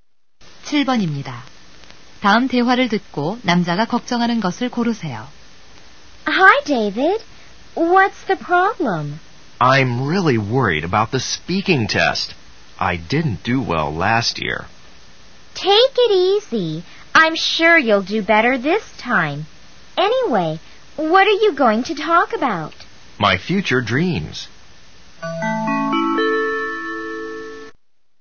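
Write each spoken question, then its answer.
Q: 다음 대화를 듣고 남자가 걱정하는 것을 고르세요.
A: 말하기 시험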